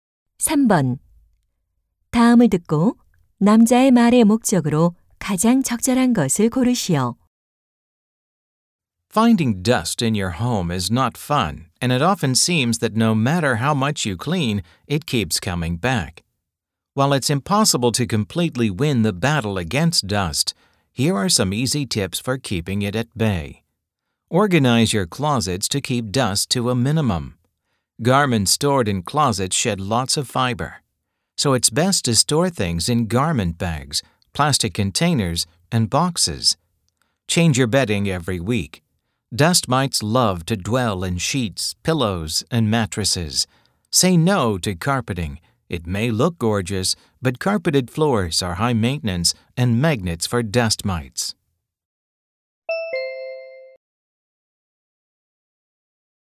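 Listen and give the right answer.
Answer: 집 안의 먼지를 줄이는 방법을 알려 주려고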